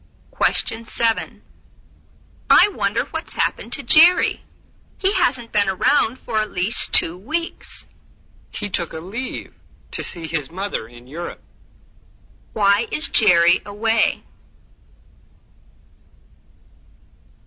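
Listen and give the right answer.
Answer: He went to see his mother in Europe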